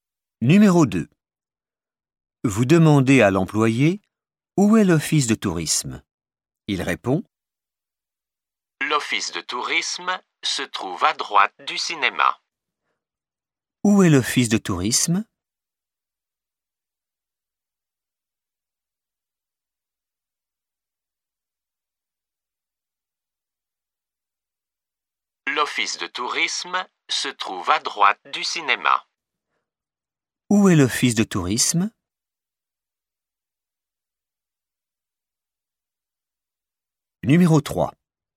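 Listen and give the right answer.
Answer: À droite du cinéma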